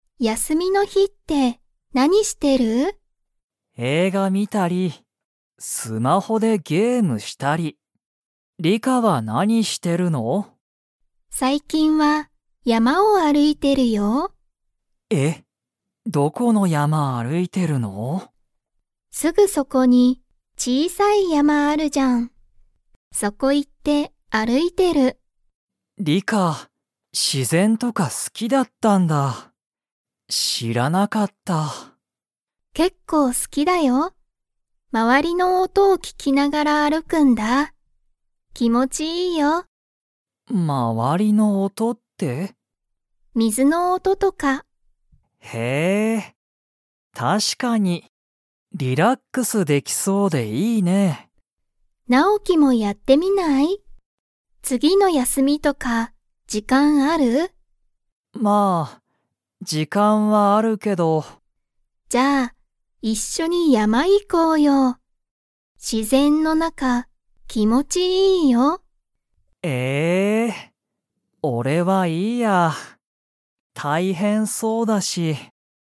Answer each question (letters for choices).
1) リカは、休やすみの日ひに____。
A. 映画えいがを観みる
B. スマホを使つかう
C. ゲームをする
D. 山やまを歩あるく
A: D

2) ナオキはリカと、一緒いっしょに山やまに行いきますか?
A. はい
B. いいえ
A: B

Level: Level 2